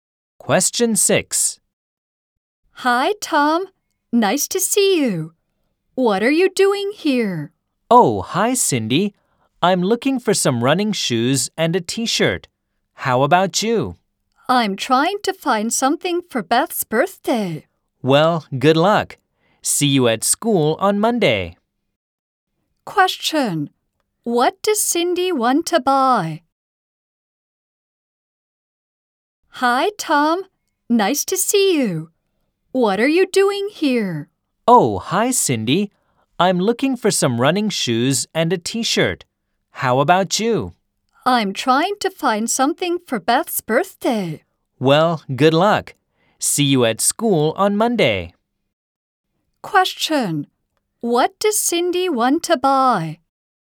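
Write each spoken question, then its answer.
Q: What does Cindy want to buy?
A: Something for Beth's birthday.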